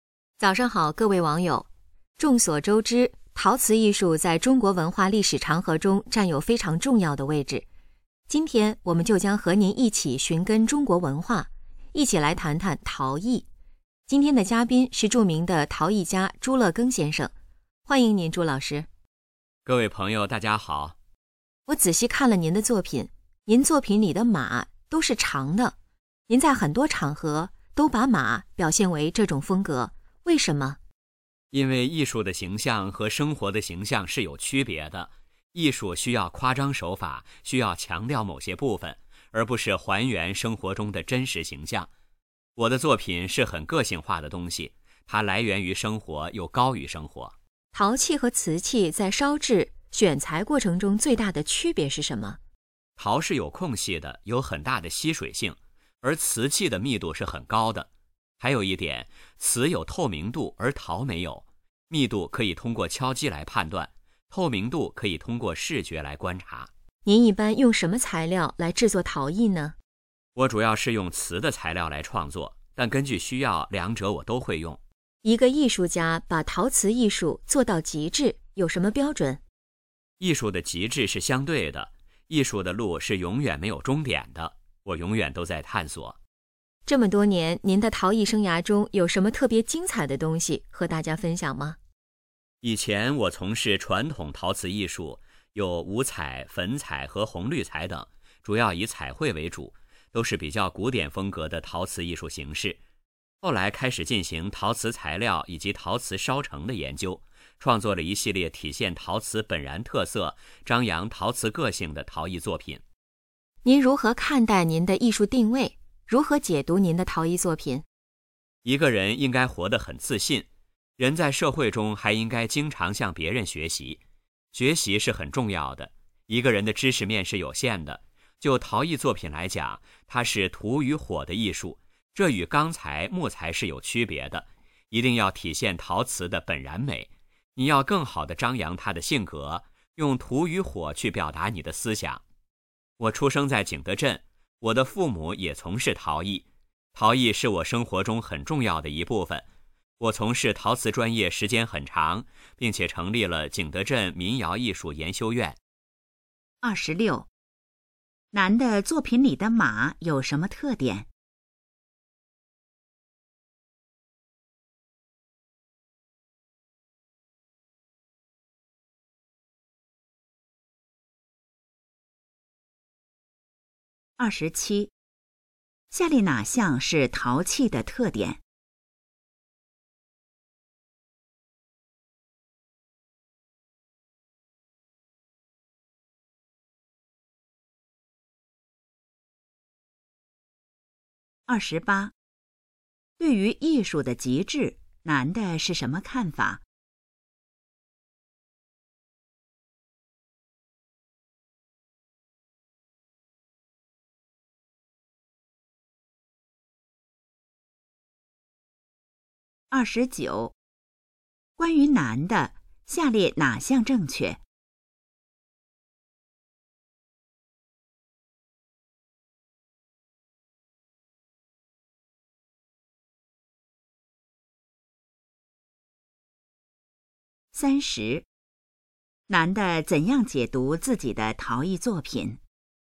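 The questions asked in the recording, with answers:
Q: 男的作品里的马有什么特点?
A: 都是长的

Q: 对于艺术的极致,男的是什么看法?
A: 极致是相对的,艺术没有终点

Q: 男的怎样解读自己的陶艺作品?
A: 体现陶瓷的本然美,用土与火表达思想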